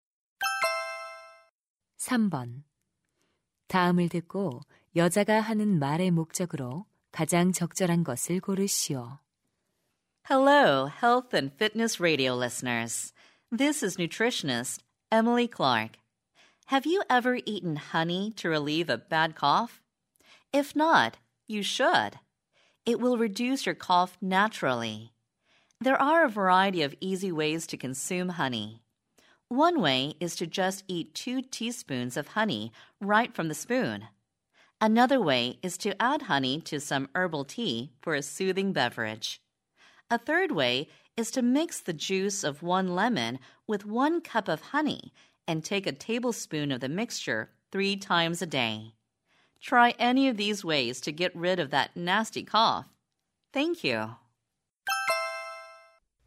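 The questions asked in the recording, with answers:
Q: 다음을 듣고 여자가 하는 말의 목적으로 가장 적절한 것을 고르시오.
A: 기침 완화를 위해 꿀 섭취를 권장하려고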